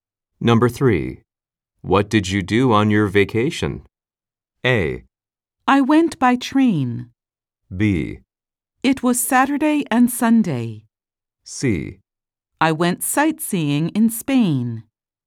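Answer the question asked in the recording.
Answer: C: I went sightseeing in Spain.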